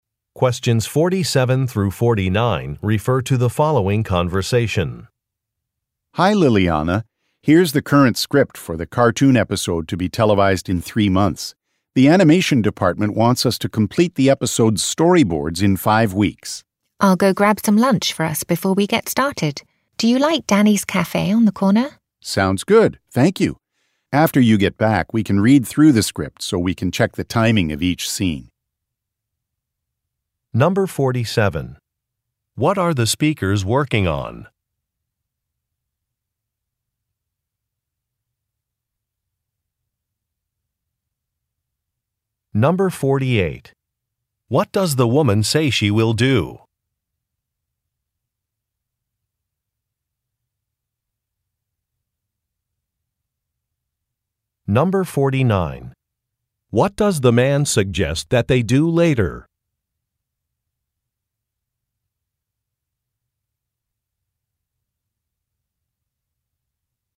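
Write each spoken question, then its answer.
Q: What are the speakers working on?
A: Storyboards for a cartoon episode

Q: What does the woman say she will do?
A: Get lunch for them

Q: What does the man suggest that they do later?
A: Read through the script to check the timing of each scene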